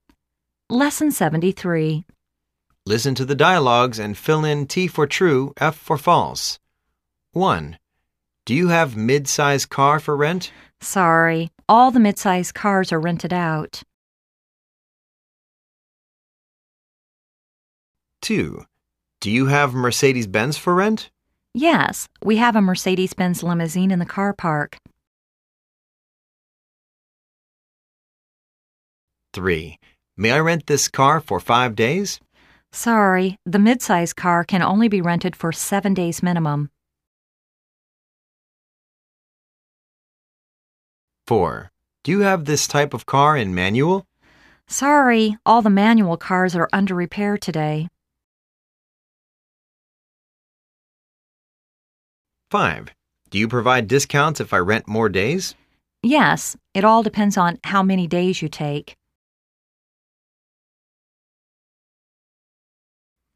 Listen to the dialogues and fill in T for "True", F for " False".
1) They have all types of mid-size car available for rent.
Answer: F

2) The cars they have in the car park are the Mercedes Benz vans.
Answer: F

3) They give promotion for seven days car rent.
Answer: F

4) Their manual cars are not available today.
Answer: T

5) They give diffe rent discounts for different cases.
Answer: T